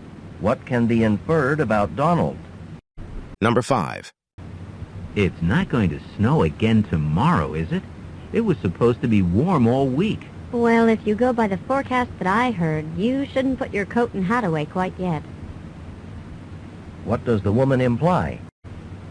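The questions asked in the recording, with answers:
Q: What does the woman imply?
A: It will probably be cold or snow again tomorrow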